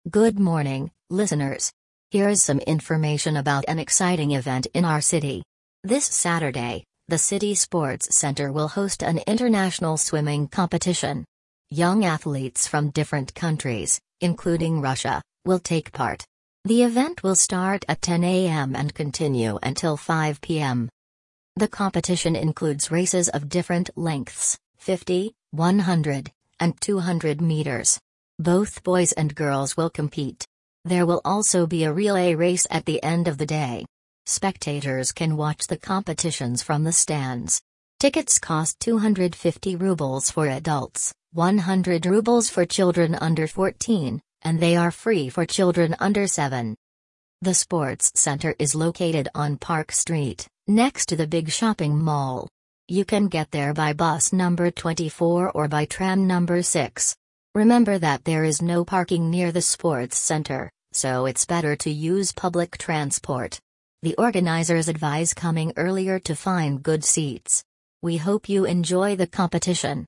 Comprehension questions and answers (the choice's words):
Прослушайте текст и выберите правильный вариант ответа (A, B, C или D).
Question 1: What kind of event is taking place?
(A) A football match.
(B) A swimming competition.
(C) A running marathon.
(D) A cycling race.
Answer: A swimming competition.

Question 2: When does the event start?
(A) At 9 am.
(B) At 10 am.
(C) At 12 pm.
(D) At 5 pm.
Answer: At 10 am.

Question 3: What race will take place at the end of the day?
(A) A 50-metre race.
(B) A 100-metre race.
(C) A 200-metre race.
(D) A relay race.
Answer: A relay race.

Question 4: How much is a ticket for children under 14?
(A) Free.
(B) 50 rubles.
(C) 100 rubles.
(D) 250 rubles.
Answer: 100 rubles.

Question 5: What advice do the organisers give?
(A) To use public transport and come earlier.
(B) To bring food and drinks.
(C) To park near the sports centre.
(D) To buy tickets only at the entrance.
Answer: To use public transport and come earlier.

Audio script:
Good morning, listeners! Here is some information about an exciting event in our city. This Saturday, the City Sports Centre will host an international swimming competition. Young athletes from different countries, including Russia, will take part. The event will start at 10 am and continue until 5 pm.
The competition includes races of different lengths: 50, 100, and 200 metres. Both boys and girls will compete. There will also be a relay race at the end of the day. Spectators can watch the competitions from the stands. Tickets cost 250 rubles for adults, 100 rubles for children under 14, and they are free for children under 7.
The sports centre is located on Park Street, next to the big shopping mall. You can get there by bus number 24 or by tram number 6. Remember that there is no parking near the sports centre, so it's better to use public transport. The organisers advise coming earlier to find good seats. We hope you enjoy the competition!

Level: 8 класс